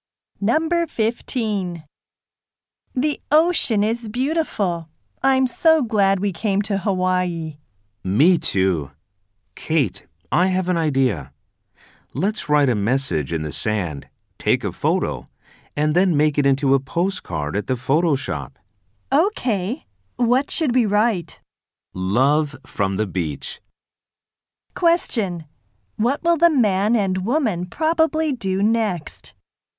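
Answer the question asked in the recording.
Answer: Write a message in the sand and take a photo of it.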